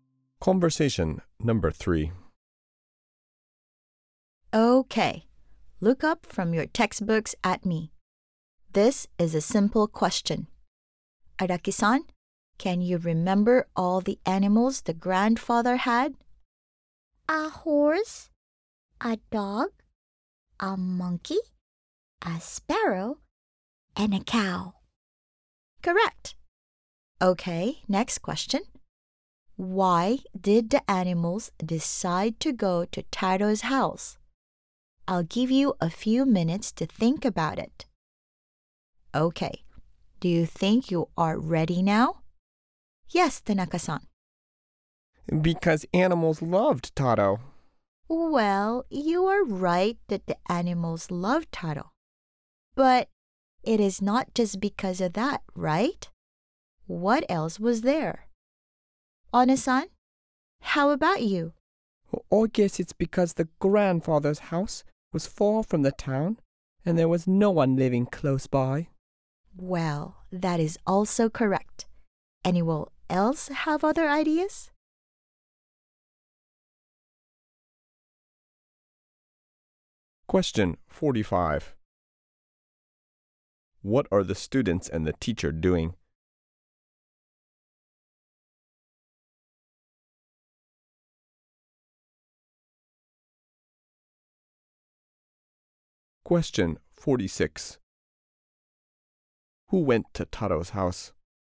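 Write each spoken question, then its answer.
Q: What are the students and the teacher doing?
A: Talking about a story they read in their textbooks

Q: Who went to Taro's house?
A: The grandfather's animals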